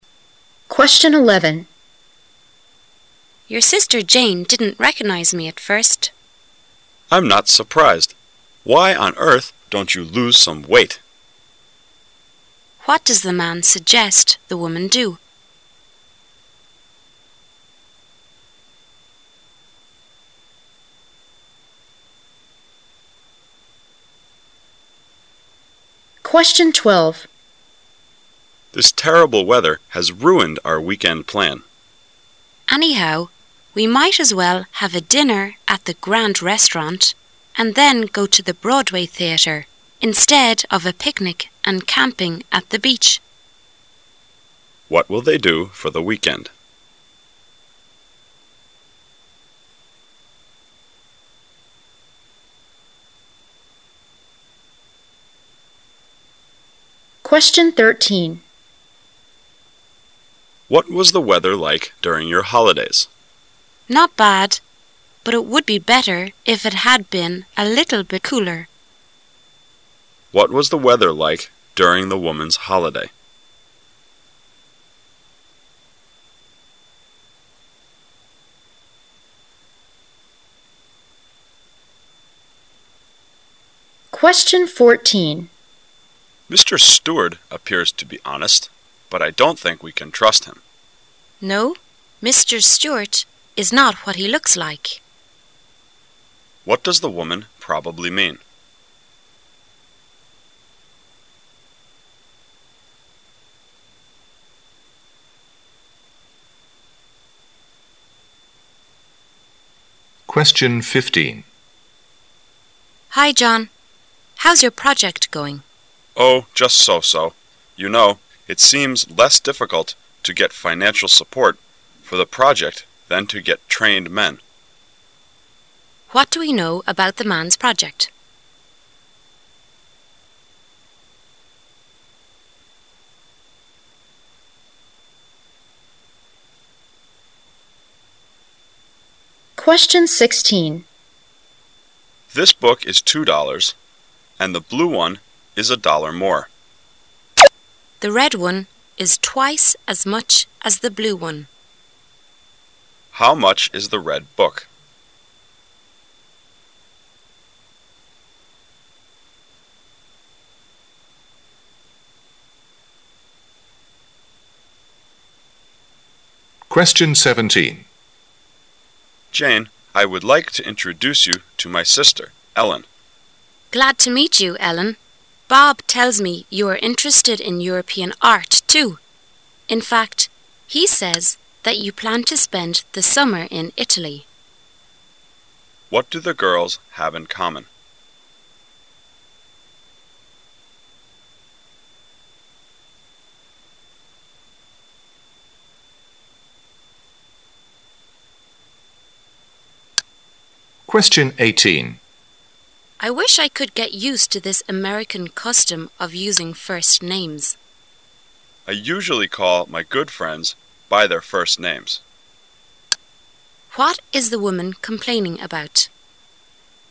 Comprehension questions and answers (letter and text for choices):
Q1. What was the weather like during the woman's holidays?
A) The weather was better.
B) The weather was a little bit warmer.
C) The weather was a little bit colder.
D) The weather was cooler than expected.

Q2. What does the woman probably mean?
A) Mr. Steward is honest.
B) Mr. Steward looks honest.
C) Mr. Steward looks dishonest.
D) Mr. Steward is dishonest.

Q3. How much is the red book?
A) $2.00.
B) $6.00.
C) $4.00.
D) $5.00.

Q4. What is the woman complaining about?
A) Not getting what she wants.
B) A custom that is new to her.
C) Calling up customers.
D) Some of her good friends.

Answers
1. B) The weather was a little bit warmer.
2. D) Mr. Steward is dishonest.
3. B) $6.00.
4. B) A custom that is new to her.

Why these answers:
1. M: What was the weather like during your holidays? W: Not bad, but it would be better if it had been a little bit cooler. Q: What was the weather like during the woman's holidays?
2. M: Mr. Steward appears to be honest. But I don't think we can trust him. W: No, Mr. Steward is not what he looks like. Q: What does the woman probably mean?
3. M: This book is $ 2.00 and the blue one is a dollar more. W: The red one is twice as much as the blue one. Q: How much is the red book?
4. W: I wish I could get used to this American custom of using first names. M: I usually call my good friends by their first names. Q: What is the woman complaining about?